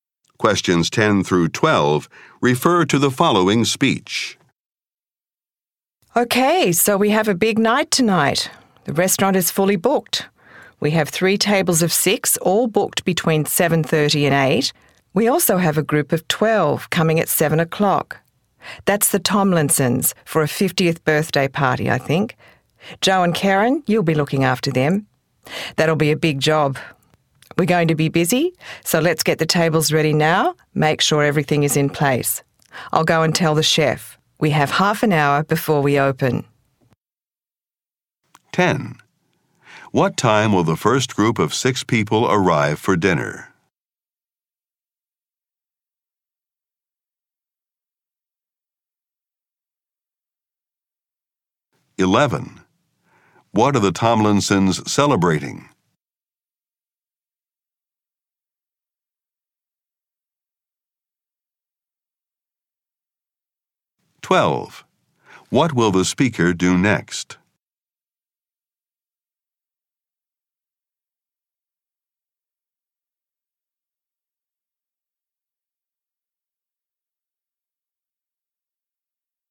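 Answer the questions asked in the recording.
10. Between 7:30 and 8
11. A 50th birthday
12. Go and tell the chef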